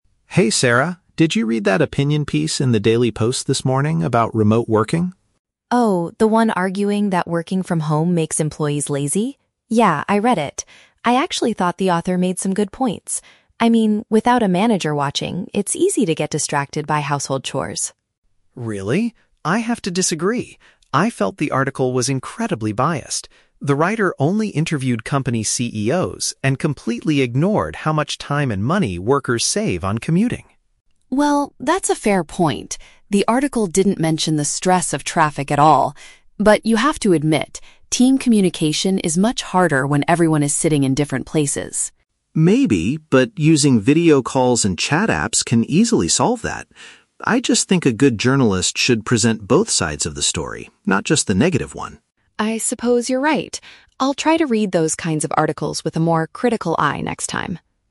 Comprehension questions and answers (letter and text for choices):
Listen to a conversation between two colleagues. Choose the correct answer (A, B, or C) for each question.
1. What was the main argument of the newspaper article?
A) Doing professional tasks from home reduces staff productivity.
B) People spend too much time reading the news at the office.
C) Managers need to organize more video meetings with their team.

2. Why does Mike think the article is unfair?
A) The writer did not understand how to use modern chat applications.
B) The newspaper refused to publish comments from the local workers.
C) The author only focused on the perspectives of business leaders.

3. What is one thing that both speakers agree on?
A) Journalists usually prefer writing negative stories.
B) Traveling to the workplace can be a stressful experience.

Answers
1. A) Doing professional tasks from home reduces staff productivity.
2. C) The author only focused on the perspectives of business leaders.
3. B) Traveling to the workplace can be a stressful experience.

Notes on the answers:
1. Sarah says the article argued that "working from home makes employees lazy". Option A paraphrases this idea perfectly (reduces staff productivity = makes employees lazy; doing professional tasks from home = working from home). Option B is not mentioned. Option C is the Trap: "Video calls" and "managers" are mentioned later in the audio, but they are not the main argument of the article.
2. Mike criticizes the article because the writer "only interviewed company CEOs" (business leaders). Option C uses synonyms to express this exact flaw. Option A is the Trap: Mike mentions "chat apps", but as a solution for communication, not because the writer didn't know how to use them. Option B is plausible but is never mentioned.
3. Mike mentions the time saved on "commuting", and Sarah agrees, saying, "That's a fair point. The article didn't mention the stress of traffic at all." Option B paraphrases "commuting" and "stress of traffic" as "traveling to the workplace can be a stressful experience". Option A is the Trap: Mike says journalists should present both sides, not just the negative one, but he doesn't say they usually prefer negative stories. Option C mixes up "video calls" and "save money" to distract the listener.

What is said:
Mike: Hey, Sarah. Did you read that opinion piece in The Daily Post this morning about remote working?
Sarah: Oh, the one arguing that working from home makes employees lazy? Yeah, I read it. I actually thought the author made some good points. I mean, without a manager watching, it's easy to get distracted by household chores.
Mike: Really? I have to disagree. I felt the article was incredibly biased. The writer only interviewed company CEOs and completely ignored how much time and money workers save on commuting.
Sarah: Well, that's a fair point. The article didn't mention the stress of traffic at all. But you have to admit, team communication is much harder when everyone is sitting in different places.
Mike: Maybe, but using video calls and chat apps can easily solve that. I just think a good journalist should present both sides of the story, not just the negative one.
Sarah: I suppose you're right. I'll try to read those kinds of articles with a more critical eye next time.